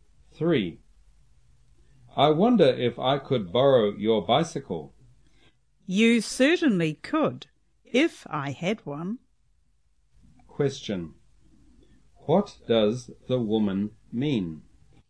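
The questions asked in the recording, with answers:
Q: What does the woman mean?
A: She doesn't have a bicycle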